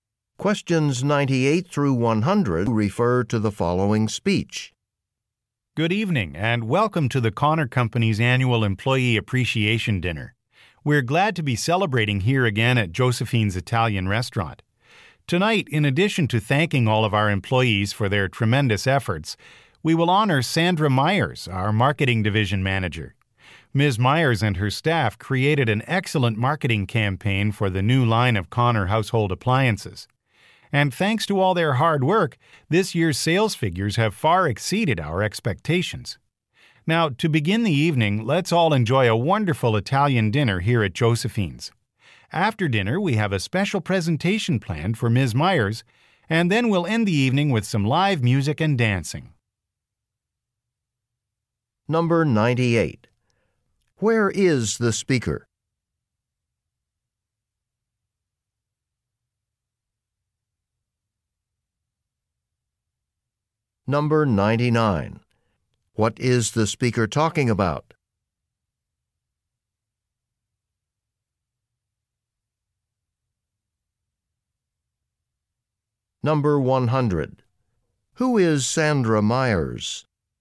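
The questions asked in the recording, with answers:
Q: Where is the speaker?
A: At Josephine's Italian Restaurant

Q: Who is Sandra Myers?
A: The Marketing Division Manager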